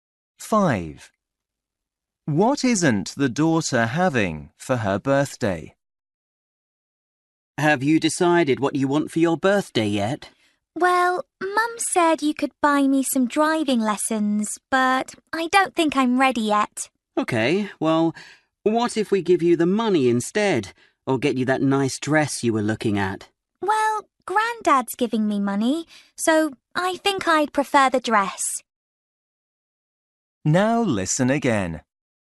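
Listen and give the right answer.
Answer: Driving lessons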